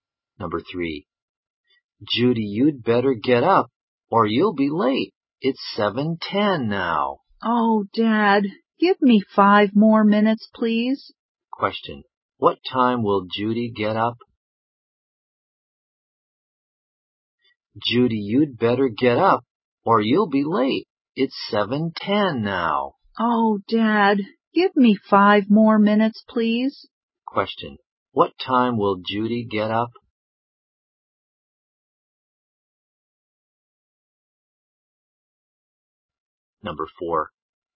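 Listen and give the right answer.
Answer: At 7:15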